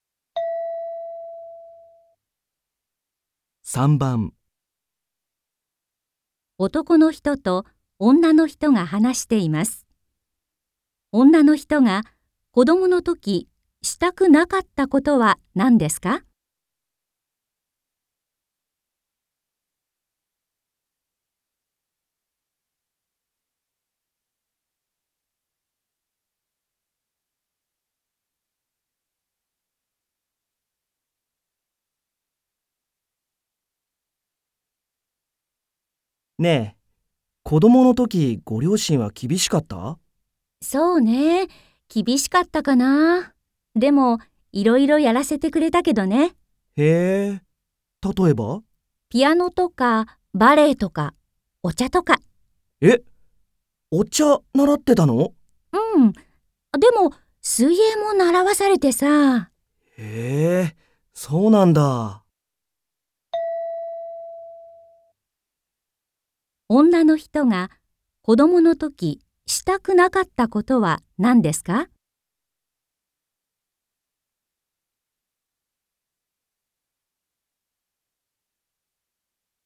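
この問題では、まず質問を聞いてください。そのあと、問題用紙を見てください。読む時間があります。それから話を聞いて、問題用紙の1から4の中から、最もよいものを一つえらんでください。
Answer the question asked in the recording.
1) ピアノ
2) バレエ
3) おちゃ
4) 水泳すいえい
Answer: 4) 水泳すいえい

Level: N3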